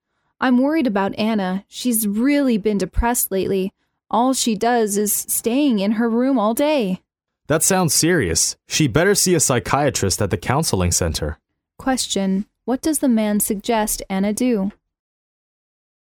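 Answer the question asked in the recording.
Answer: See a psychiatrist at the counseling center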